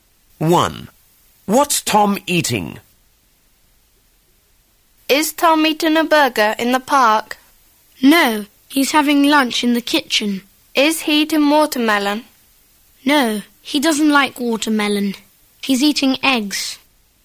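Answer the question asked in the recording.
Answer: Eggs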